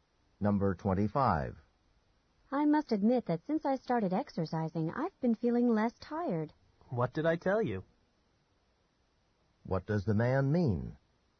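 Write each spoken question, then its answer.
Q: What does the man mean?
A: He had told her exercise would help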